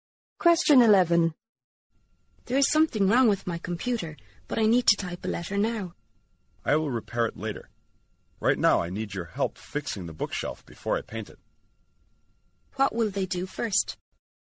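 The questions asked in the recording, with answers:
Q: What will they do first?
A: Fix the bookshelf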